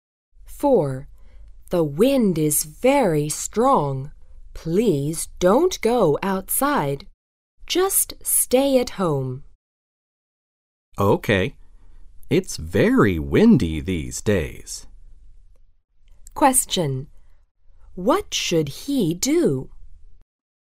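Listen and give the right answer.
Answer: Stay at home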